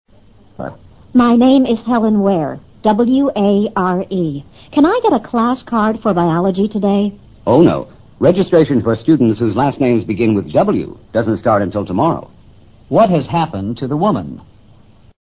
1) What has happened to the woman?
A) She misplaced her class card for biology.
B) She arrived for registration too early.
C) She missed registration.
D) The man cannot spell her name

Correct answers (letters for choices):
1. B

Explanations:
登记注册上课也按姓氏"笔划"安排时间,这对中国读者是件陌生的事。如果能听明白Registration for students whose last names begin with "W" doesn't start until tomorrow 一句话的最后几个字也大致可以做出正确的判断了。